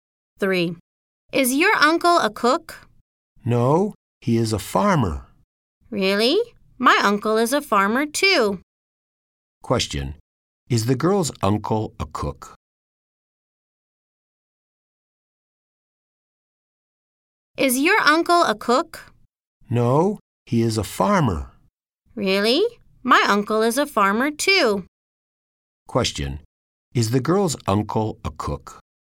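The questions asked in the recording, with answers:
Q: Is the girl's uncle a cook?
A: No, he is a farmer.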